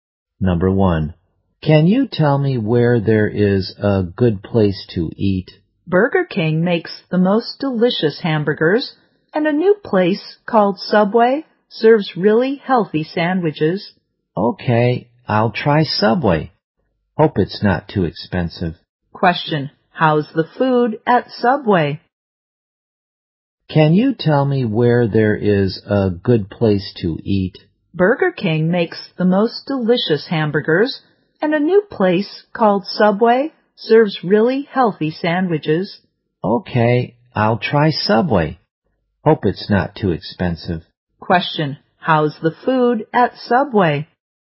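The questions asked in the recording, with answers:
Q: how's the food at Subway?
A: Really healthy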